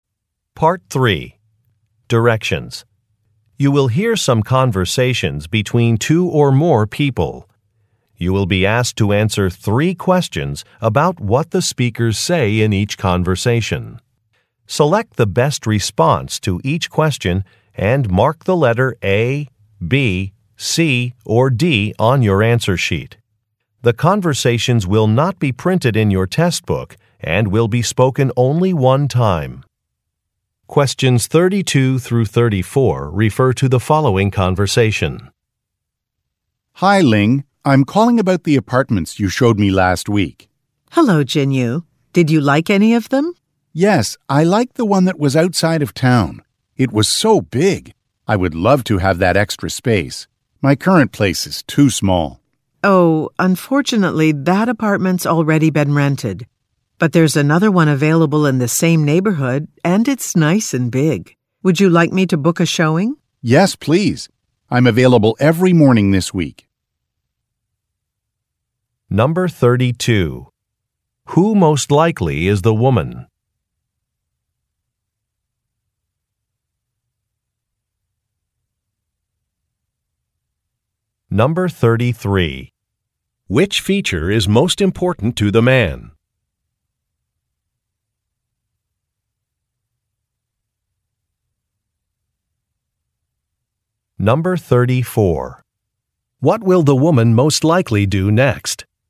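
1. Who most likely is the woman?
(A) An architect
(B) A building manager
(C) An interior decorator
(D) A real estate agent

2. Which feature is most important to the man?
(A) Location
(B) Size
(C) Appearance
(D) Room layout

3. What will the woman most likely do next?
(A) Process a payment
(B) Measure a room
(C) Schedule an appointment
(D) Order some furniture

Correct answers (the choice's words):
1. A real estate agent
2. Size
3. Schedule an appointment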